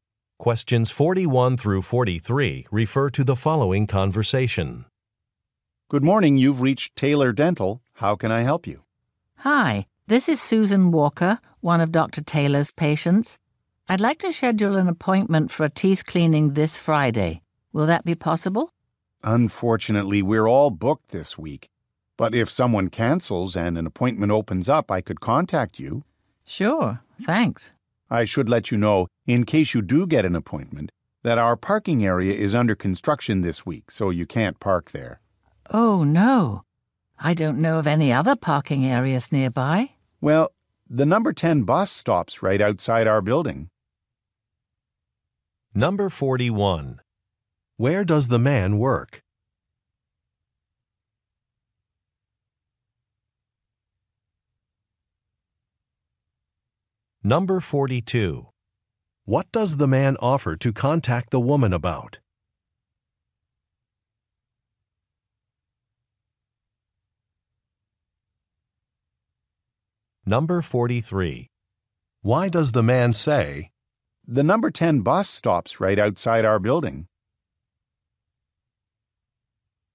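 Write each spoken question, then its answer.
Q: Where does the man work?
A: At a dental office

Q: What does the man offer to contact the woman about?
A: An appointment opening up if someone cancels

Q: "The number 10 bus stops right outside our building"?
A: To suggest she take the bus since parking is unavailable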